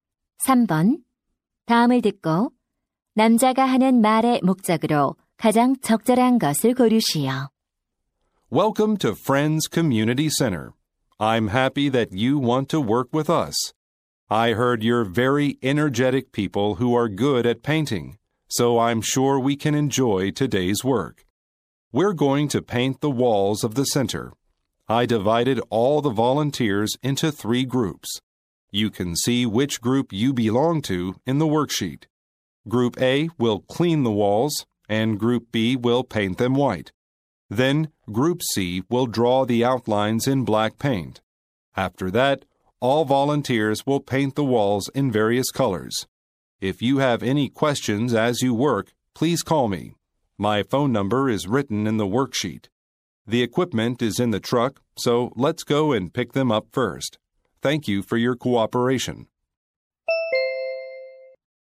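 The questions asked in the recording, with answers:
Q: 다음을 듣고 남자가 하는 말의 목적으로 가장 적절한 것을 고르시오.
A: 자원봉사자들에게 벽 페인트칠 작업 계획을 안내하려고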